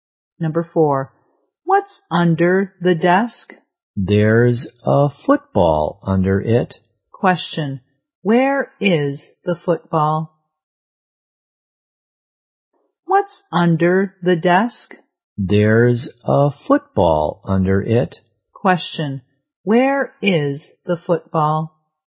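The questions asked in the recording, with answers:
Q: where is the football?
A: Under the desk.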